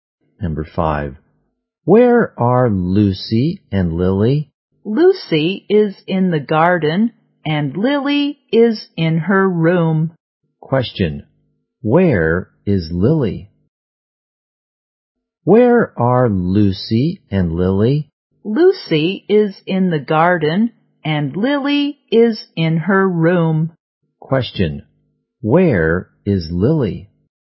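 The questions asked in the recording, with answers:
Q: where is Lily?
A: In her room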